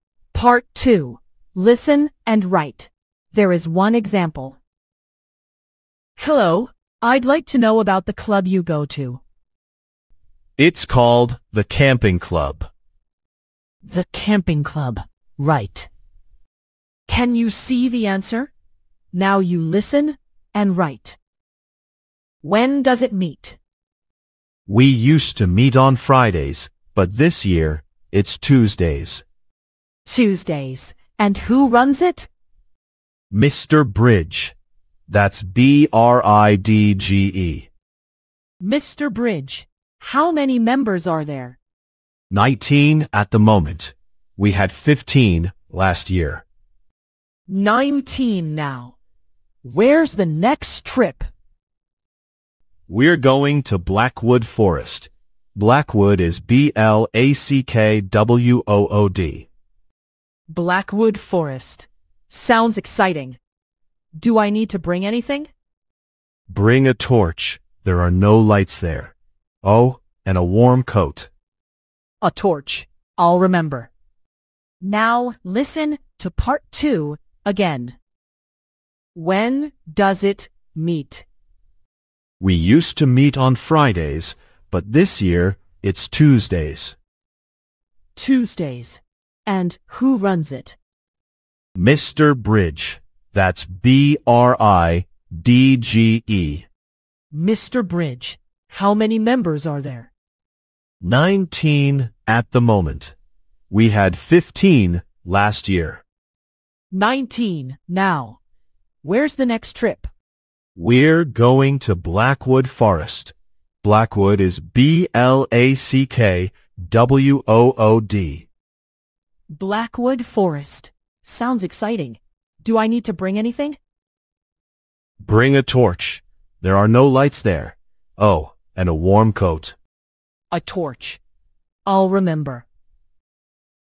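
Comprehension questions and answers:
聽並把答案寫在線上。第一個是範例。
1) Meets on: (1)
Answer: Tuesdays

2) Teacher's name: Mr (2)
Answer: Bridge

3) Number of members: (3)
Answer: 19

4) Next trip is to: (4)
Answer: Blackwood Forest

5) Must bring: a (5)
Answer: torch

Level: Flyers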